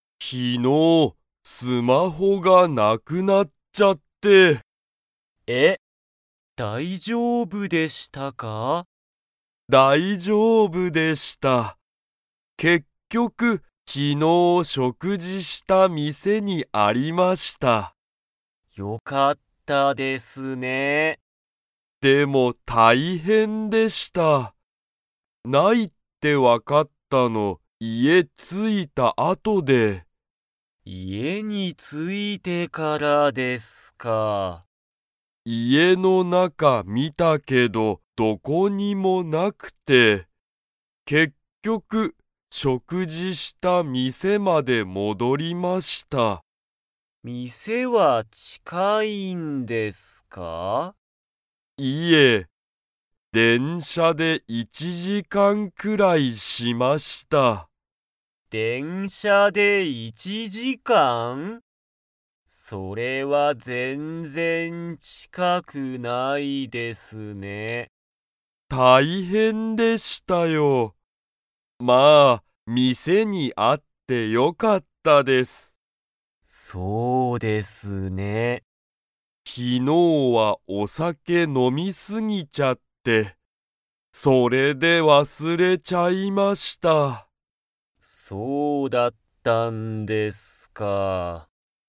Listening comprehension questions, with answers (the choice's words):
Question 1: 山本やまもとさんのスマホは、どこにありましたか?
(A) 会社かいしゃ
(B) 家いえ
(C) 学校がっこう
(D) 店みせ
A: 店みせ

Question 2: 山本やまもとさんは、昨日きのうお酒さけを 。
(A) 飲のみすぎた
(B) 全然ぜんぜん飲のまなかった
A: 飲のみすぎた

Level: Level 3